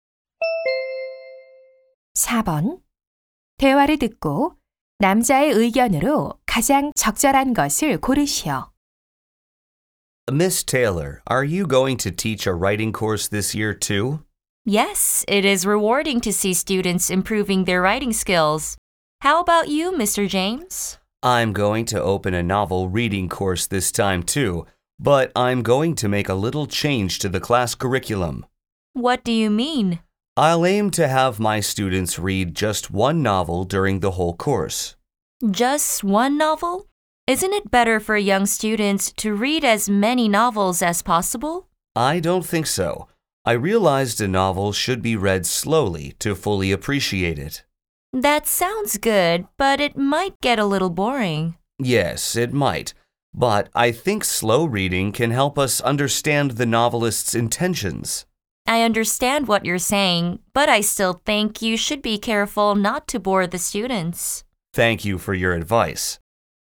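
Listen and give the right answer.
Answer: 소설은 천천히 읽어야 작가의 의도를 제대로 이해할 수 있다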